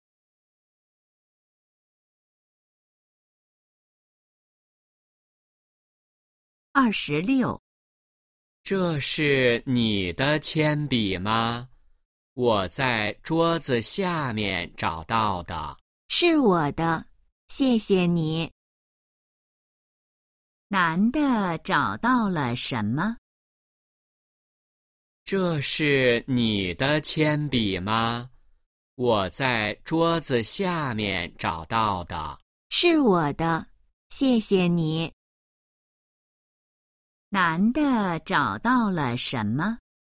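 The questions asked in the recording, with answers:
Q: 男的找到了什么?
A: 铅笔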